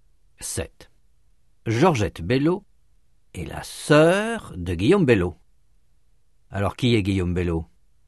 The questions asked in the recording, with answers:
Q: Alors, qui est Guillaume Bello?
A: Le frère de Georgette.